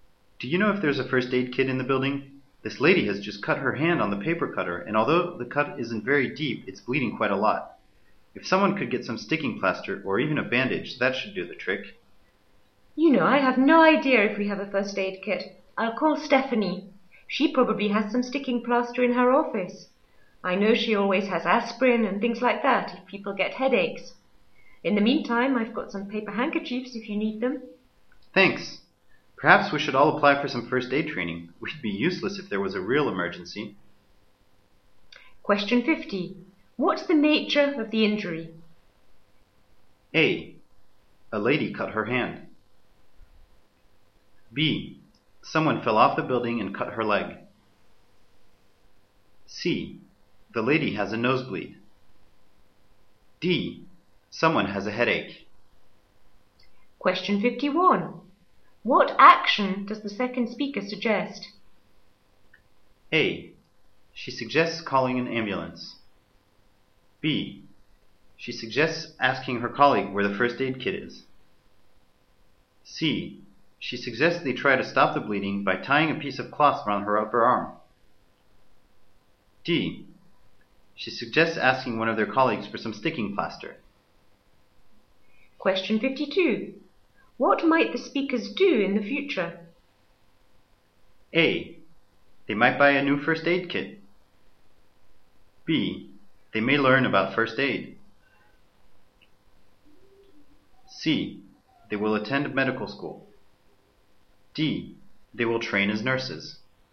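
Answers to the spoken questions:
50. A: A lady cut her hand.
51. D: She suggests asking one of their colleagues for some sticking plaster.
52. B: They may learn about first aid.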